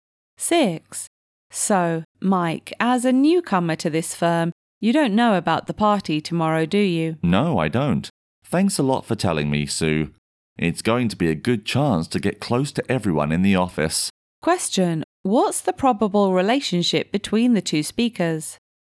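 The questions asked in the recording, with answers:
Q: What's the probable relationship between the two speakers?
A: Colleagues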